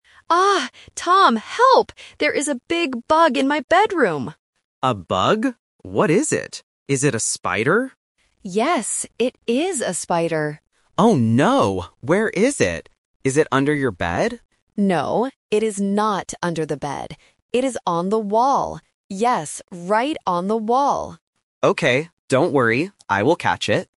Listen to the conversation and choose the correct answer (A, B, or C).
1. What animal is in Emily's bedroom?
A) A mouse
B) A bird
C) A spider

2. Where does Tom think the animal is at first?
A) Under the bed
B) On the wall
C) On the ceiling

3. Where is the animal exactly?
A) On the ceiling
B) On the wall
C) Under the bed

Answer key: 1C, 2A, 3B

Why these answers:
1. Emily confirms, "Yes, it is a spider!". Options (A) and (B) are plausible animals that could be in a house, but they are not mentioned in the audio.
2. Tom asks, "Is it under your bed?" Option (B) is the trap because it is the actual location of the spider, not where Tom initially guesses. Option (C) is not mentioned.
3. Emily explicitly states, "No, it is not under the bed. It is on the wall." Option (C) "Under the bed" is the trap because Tom mentions it, but Emily rejects it with a "No". Option (A) is a plausible place for a bug but is absent from the script.

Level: A1

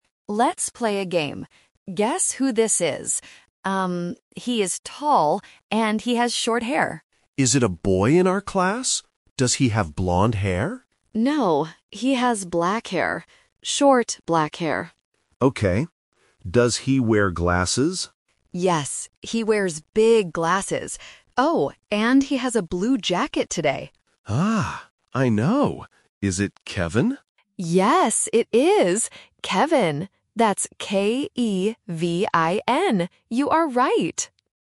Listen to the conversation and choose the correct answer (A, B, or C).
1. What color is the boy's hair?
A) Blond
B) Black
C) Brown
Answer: B

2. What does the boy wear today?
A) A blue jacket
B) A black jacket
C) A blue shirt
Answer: A

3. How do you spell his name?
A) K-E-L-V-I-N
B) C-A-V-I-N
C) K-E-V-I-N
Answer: C

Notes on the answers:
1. Speaker A clearly says, "No, he has black hair." Why the trap is wrong: Option (A) Blond is a trap. Speaker B asks if the boy has blond hair, but Speaker A says "No". Option (C) Brown is not mentioned at all.
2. Speaker A says, "he has a blue jacket today." Why the trap is wrong: Option (B) A black jacket is a trap because the word "black" was used earlier to describe his hair, not his jacket. Option (C) A blue shirt has the correct color, but the wrong clothing item.
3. Speaker A spells the name out loud: "That's K-E-V-I-N." Why the trap is wrong: Option (B) C-A-V-I-N is a trap because the letter "C" sounds a bit like "K", and "A" can sound like "E" to beginners. Option (A) K-E-L-V-I-N is a very similar name but has an extra "L".

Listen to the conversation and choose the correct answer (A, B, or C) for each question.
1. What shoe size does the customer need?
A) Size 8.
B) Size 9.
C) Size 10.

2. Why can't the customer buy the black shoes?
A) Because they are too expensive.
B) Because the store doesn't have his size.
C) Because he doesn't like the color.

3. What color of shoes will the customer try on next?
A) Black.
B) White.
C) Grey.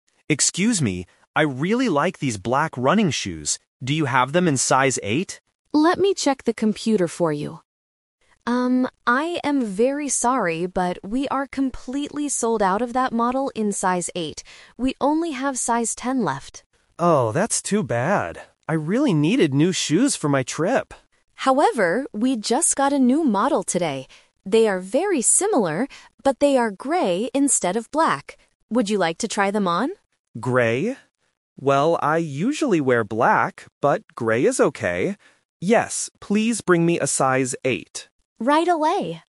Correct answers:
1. A
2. B
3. C

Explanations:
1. The customer asks at the beginning, "Do you have them in size eight?" and at the end confirms, "please bring me a size eight."
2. The assistant checks the computer and says, "we are completely sold out of that model in size eight."
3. This is "The Twist". The black shoes are out of stock, so the assistant suggests a new model: "they are grey instead of black." The customer agrees to try them.

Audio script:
Customer: Excuse me, I really like these black running shoes. Do you have them in size eight?
Assistant: Let me check the computer for you. Um, I am very sorry, but we are completely sold out of that model in size eight. We only have size ten left.
Customer: Oh, that's too bad. I really needed new shoes for my trip.
Assistant: However, we just got a new model today. They are very similar, but they are grey instead of black. Would you like to try them on?
Well, I usually wear black, but grey is okay. Yes, please bring me a size eight.

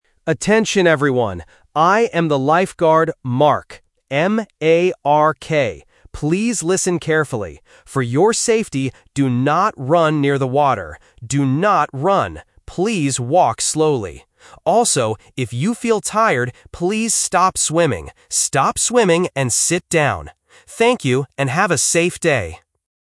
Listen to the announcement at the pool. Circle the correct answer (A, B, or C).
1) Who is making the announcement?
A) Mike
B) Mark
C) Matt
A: B

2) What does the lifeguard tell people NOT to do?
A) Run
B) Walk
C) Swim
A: A

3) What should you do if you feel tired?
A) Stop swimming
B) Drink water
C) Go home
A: A

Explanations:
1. The speaker explicitly says his name and spells it out: "M-A-R-K". Option A (Mike) and Option C (Matt) are phonetic traps because they are very common short names starting with the letter 'M' that often confuse beginners.
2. The lifeguard gives a clear negative instruction: "do not run near the water" and repeats "Do not run." Option B (Walk) is the trap because the lifeguard tells people to "walk slowly" (affirmative, not negative). Option C (Swim) is a plausible action at a pool, but it is not what they are forbidden to do.
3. The lifeguard clearly states, "if you feel tired, please stop swimming," and repeats the phrase "Stop swimming" (A1 repetition technique). Option B (Drink water) and Option C (Go home) are plausible, healthy things to do when tired, but they are not mentioned in the audio.

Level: A1

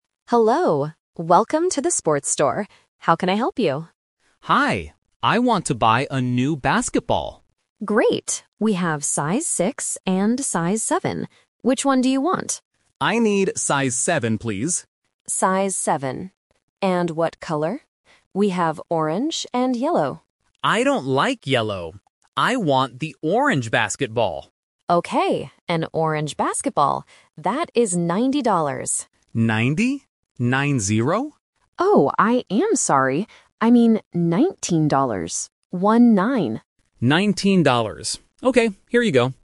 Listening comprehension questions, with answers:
Listen to the conversation in a sports store. Choose the correct answer (A, B, or C) for each question.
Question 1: What size basketball does the customer want?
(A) Size 6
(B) Size 7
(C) Size 17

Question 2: What color is the basketball?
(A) Orange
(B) Yellow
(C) Brown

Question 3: How much is the basketball?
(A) $9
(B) $90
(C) $19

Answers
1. B
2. A
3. C

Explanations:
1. The customer clearly says, "I need size seven, please." Option (A) "Size 6" is a trap because the clerk mentions it as an option, but the customer does not choose it. Option (C) "Size 17" is a phonetic trap for the number 7.
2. The customer says, "I want the orange basketball." Option (B) "Yellow" is the trap; the clerk offers it, but the customer rejects it by saying, "I don't like yellow." Option (C) "Brown" is a common color for basketballs but is never mentioned in the audio.
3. The clerk makes a mistake and says "ninety dollars" at first (which is the trap in Option B). The customer is surprised ("Nine-zero?"), and the clerk corrects herself, saying, "I mean nineteen dollars. One-nine." Option (A) "$9" sounds similar but is incorrect.

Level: A1

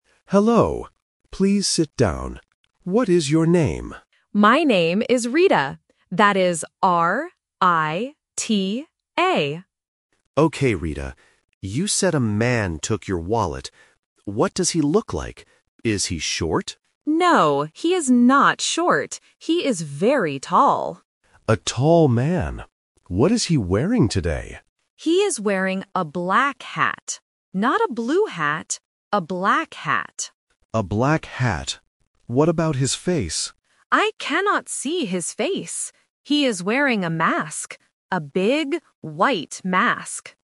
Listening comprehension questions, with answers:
Listen to the conversation and choose the correct answer (A, B, or C).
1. How do you spell the woman's name?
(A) R-E-T-A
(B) R-I-T-A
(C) R-I-D-A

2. What does the man look like?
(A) He is tall.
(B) He is short.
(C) He is old.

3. What color is the man's hat?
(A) Blue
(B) White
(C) Black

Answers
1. B
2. A
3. C

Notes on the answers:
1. The victim spells her name clearly: "R-I-T-A."
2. The victim says, "He is very tall."
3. The victim clearly states, "He is wearing a black hat."

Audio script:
Police Officer: Hello. Please sit down. What is your name?
Victim: My name is Rita. That is R-I-T-A.
Police Officer: Okay, Rita. You said a man took your wallet. What does he look like? Is he short?
Victim: No, he is not short. He is very tall.
Police Officer: A tall man. What is he wearing today?
Victim: He is wearing a black hat. Not a blue hat, a black hat.
Police Officer: A black hat. What about his face?
Victim: I cannot see his face. He is wearing a mask. A big, white mask.

